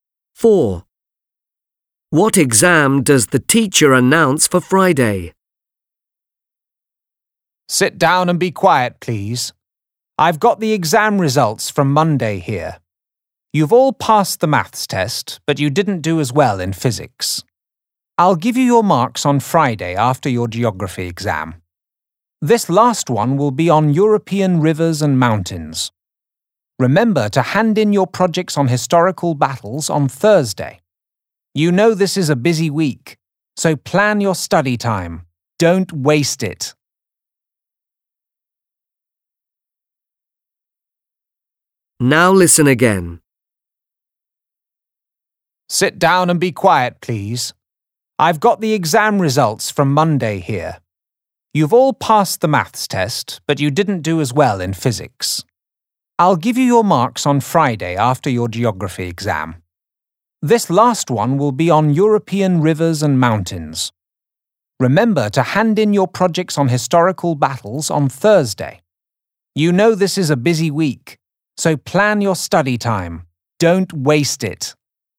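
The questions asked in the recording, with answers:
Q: What exam does the teacher announce for Friday?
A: Geography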